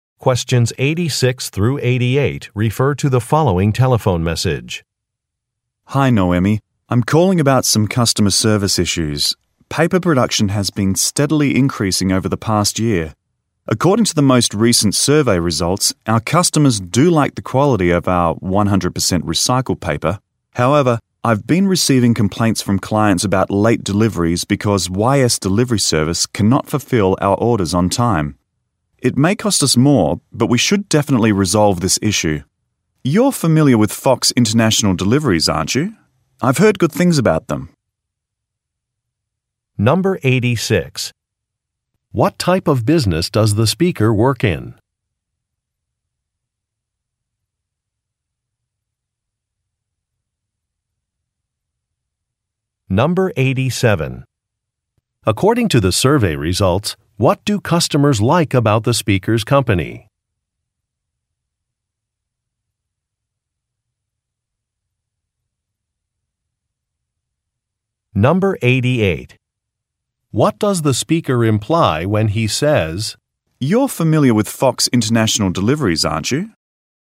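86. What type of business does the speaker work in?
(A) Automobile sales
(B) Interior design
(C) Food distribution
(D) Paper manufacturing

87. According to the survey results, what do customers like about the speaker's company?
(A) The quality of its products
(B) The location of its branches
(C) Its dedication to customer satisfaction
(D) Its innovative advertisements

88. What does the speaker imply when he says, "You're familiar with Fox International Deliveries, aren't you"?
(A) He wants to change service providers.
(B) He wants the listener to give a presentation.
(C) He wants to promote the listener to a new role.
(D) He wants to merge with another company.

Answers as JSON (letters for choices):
{"86": "D", "87": "A", "88": "A"}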